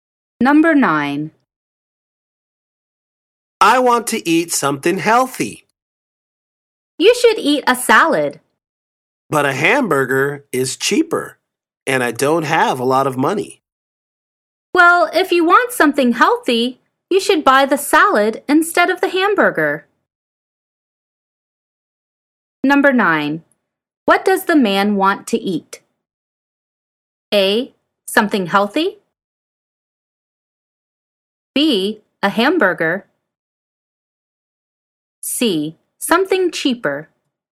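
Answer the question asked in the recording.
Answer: A: Something healthy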